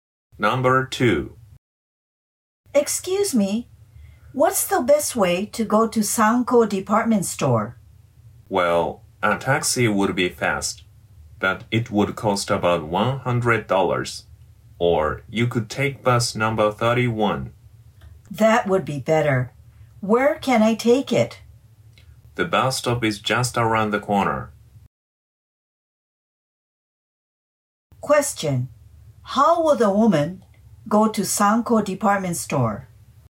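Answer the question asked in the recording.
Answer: By bus number 31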